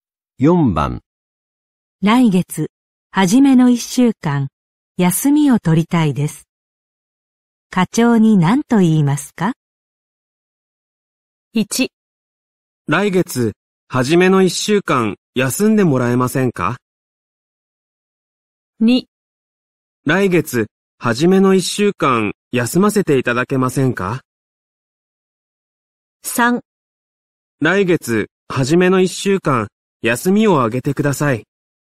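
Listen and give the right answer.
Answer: 2: 来月、初めの1週間、休ませていただけませんか?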